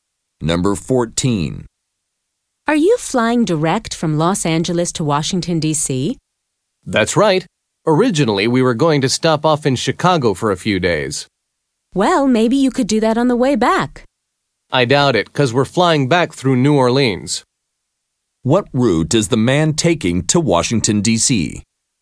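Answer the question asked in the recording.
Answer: Direct from Los Angeles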